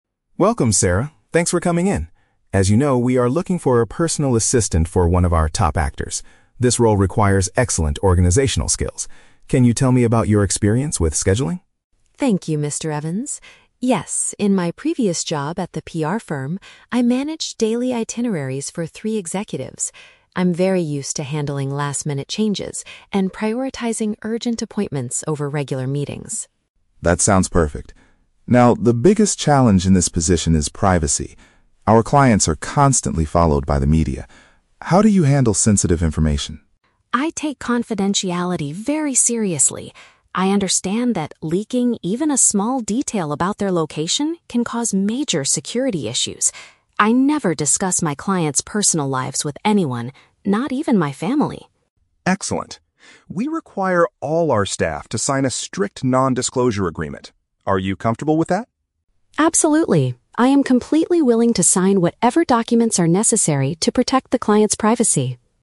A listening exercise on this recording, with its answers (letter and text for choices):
Listen to a job interview between a candidate and an HR manager. Choose the correct answer (A, B, or C) for each question.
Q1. What did Sarah do in her previous job?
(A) She worked as a personal assistant for a famous movie actor.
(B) She organized the daily schedules for several company managers.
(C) She provided personal security for high-profile clients at a PR firm.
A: (B) She organized the daily schedules for several company managers.

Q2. According to Sarah, why is keeping secrets so important in this job?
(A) Because sharing the actor's location could lead to safety risks.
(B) Because she does not want her family to know about her busy work life.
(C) Because the media usually pays a lot of money for private information.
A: (A) Because sharing the actor's location could lead to safety risks.

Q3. How does Sarah feel about signing the non-disclosure agreement?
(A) She thinks it is unnecessary but will do it anyway to get the job.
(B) She is a bit hesitant because she hasn't read the documents yet.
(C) She is fully prepared to accept the company's strict privacy rules.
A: (C) She is fully prepared to accept the company's strict privacy rules.

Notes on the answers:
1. Sarah says she "managed daily itineraries for three executives" (which paraphrases to "organized the daily schedules for several company managers"). Why the traps are wrong: (A) is a trap. The HR manager mentions looking for a personal assistant for an actor, but this is the current job opening, not Sarah's past job. (C) is a trap. She worked at a PR firm and mentions "security issues", but she did not work as security.
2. Sarah states that "leaking even a small detail about their location can cause major security issues" (which means sharing the location could lead to safety risks). Why the traps are wrong: (B) is a trap. Sarah mentions her family, but she says she won't discuss her clients with them, not that she wants to hide her work life from them. (C) is plausible because the media is mentioned, but the audio does not talk about the media paying money.
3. Sarah says, "Absolutely. I am completely willing to sign whatever documents are necessary" (meaning she is fully prepared to accept the privacy rules). Why the traps are wrong: (A) is a plausible negative reaction, but Sarah fully supports the rule. (B) is a trap. "Documents" are mentioned, but she shows no hesitation at all.

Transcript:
Mr. Evans: Welcome, Sarah. Thanks for coming in. As you know, we are looking for a personal assistant for one of our top actors. This role requires excellent organizational skills. Can you tell me about your experience with scheduling?
Sarah: Thank you, Mr. Evans. Yes, in my previous job at the PR firm, I managed daily itineraries for three executives. I'm very used to handling last-minute changes and prioritizing urgent appointments over regular meetings.
Mr. Evans: That sounds perfect. Now, the biggest challenge in this position is privacy. Our clients are constantly followed by the media. How do you handle sensitive information?
Sarah: I take confidentiality very seriously. I understand that leaking even a small detail about their location can cause major security issues. I never discuss my clients' personal lives with anyone, not even my family.
Mr. Evans: Excellent. We require all our staff to sign a strict non-disclosure agreement. Are you comfortable with that?
Sarah: Absolutely. I am completely willing to sign whatever documents are necessary to protect the client's privacy.